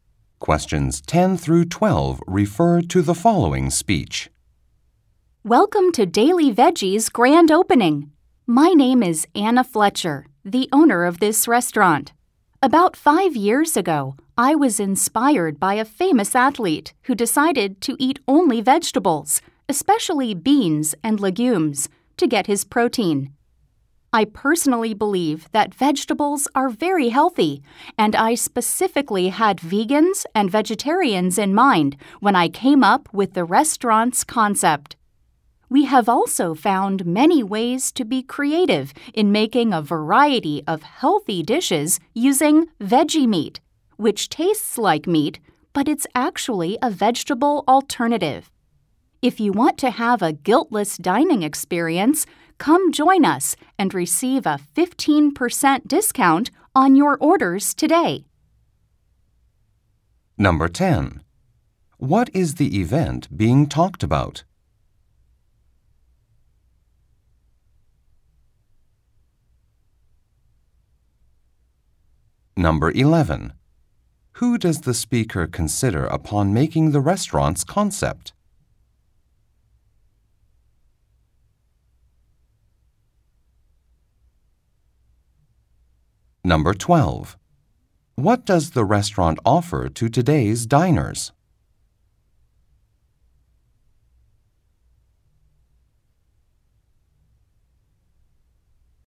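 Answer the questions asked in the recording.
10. The grand opening of the Daily Veggie restaurant
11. Vegans and vegetarians
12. A 15% discount on their orders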